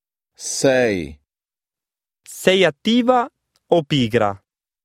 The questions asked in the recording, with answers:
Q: Sei attiva o pigra?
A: Cinzia.